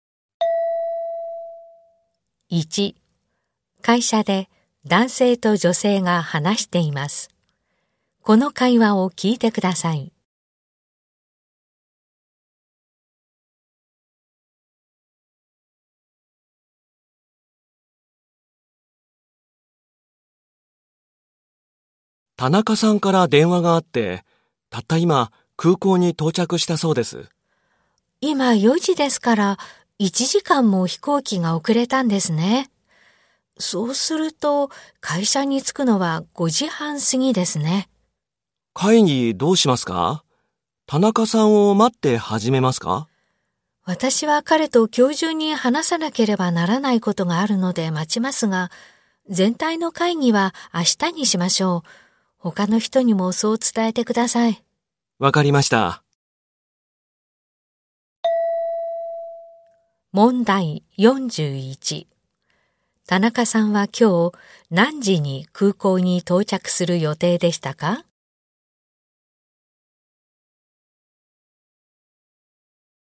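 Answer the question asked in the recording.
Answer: 3時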